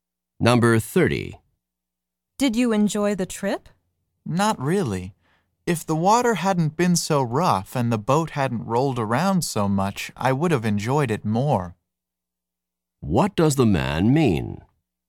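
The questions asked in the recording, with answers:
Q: What does the man mean?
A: He didn't enjoy the trip because the water was rough.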